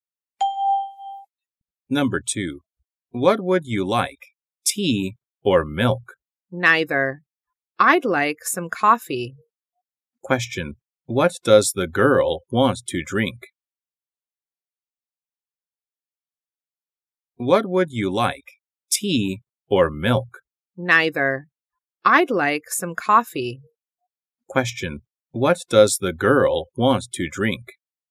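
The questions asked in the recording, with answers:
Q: what does the girl want to drink?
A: Coffee.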